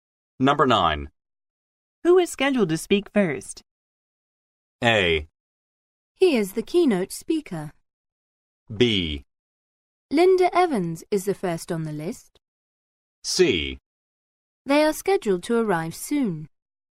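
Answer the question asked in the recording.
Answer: B: Linda Evans is the first on the list.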